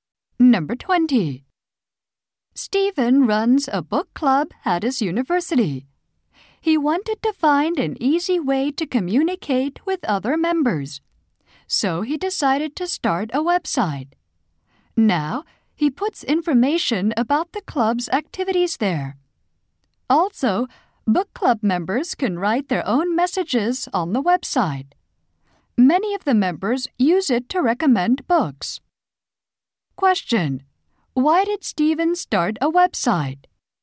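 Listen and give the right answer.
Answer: To communicate easily with the other book club members.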